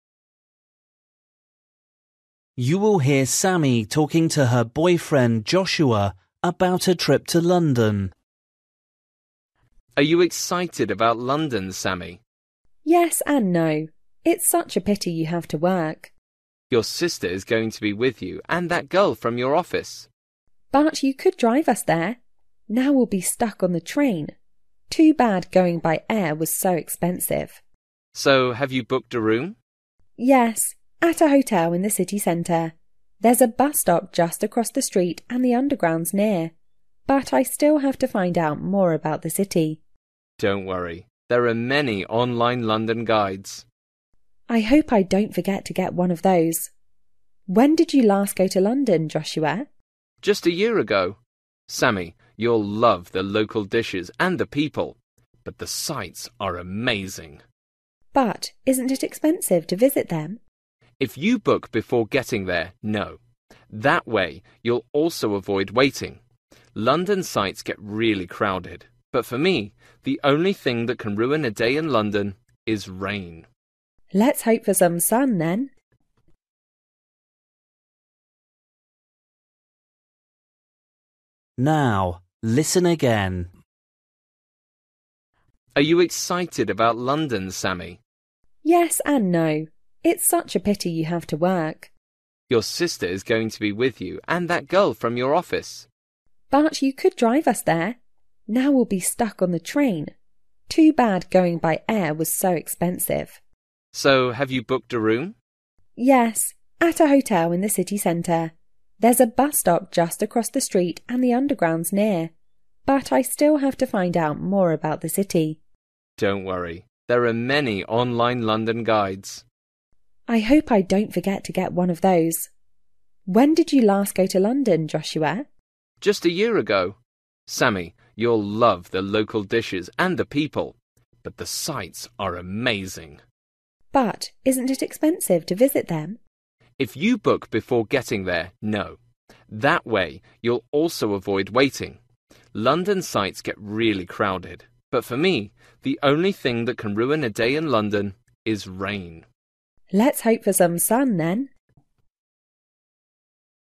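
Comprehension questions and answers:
For each question, choose the correct answer.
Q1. Who isn't going on the trip with Sammy?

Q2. They'll get there by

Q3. Sammy must remember to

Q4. What did Joshua like most about London?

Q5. Joshua tells Sammy that she should worry about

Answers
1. Joshua, her boyfriend
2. train
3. get an online London guide
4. the sights
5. the rain

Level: Luyện nghe trình độ A2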